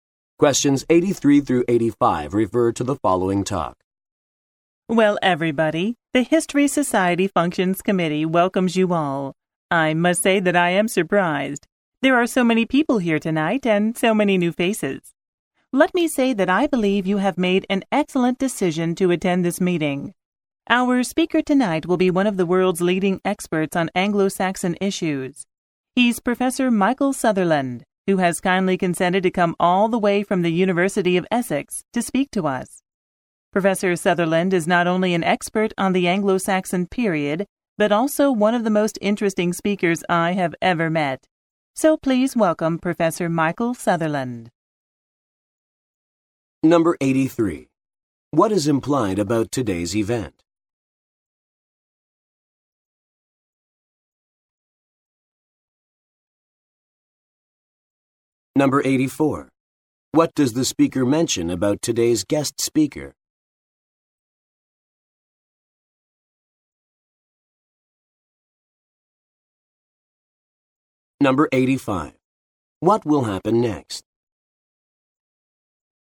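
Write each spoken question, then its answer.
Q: What does the speaker mention about today's guest speaker?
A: He is a leading expert on Anglo-Saxon issues and a very interesting speaker

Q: What will happen next?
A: Professor Sutherland will speak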